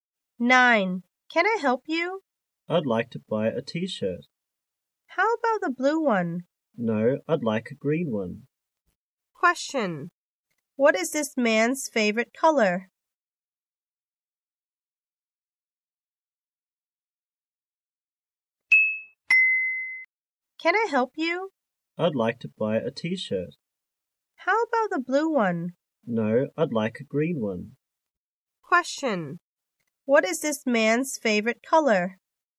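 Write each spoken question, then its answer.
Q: Question, what is this man's favorite color?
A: Green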